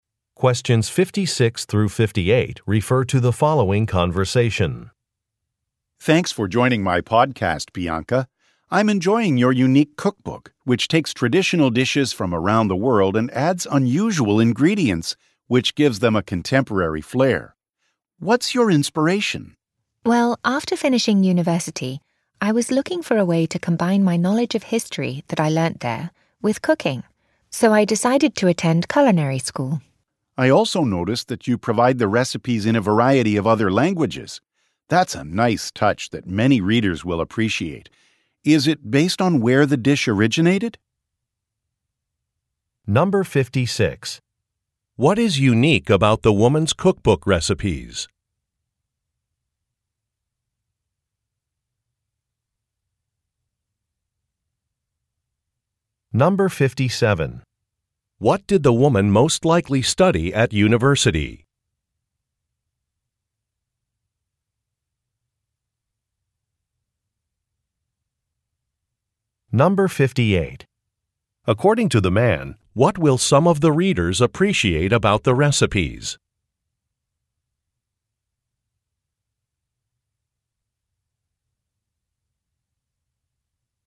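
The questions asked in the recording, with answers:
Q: What is unique about the woman's cookbook recipes?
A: They add unusual ingredients to traditional dishes from around the world

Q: What did the woman most likely study at university?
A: History

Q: According to the man, what will some of the readers appreciate about the recipes?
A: They are provided in a variety of other languages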